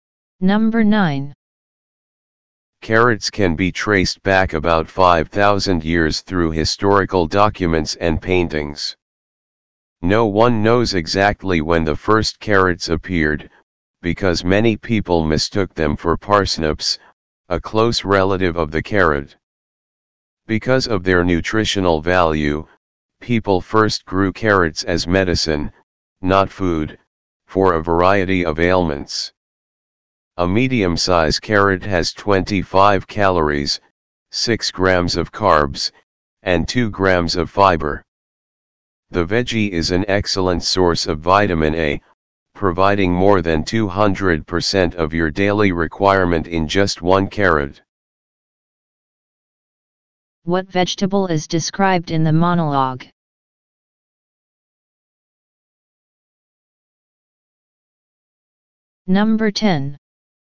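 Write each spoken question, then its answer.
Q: What vegetable is described in the monologue?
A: Carrot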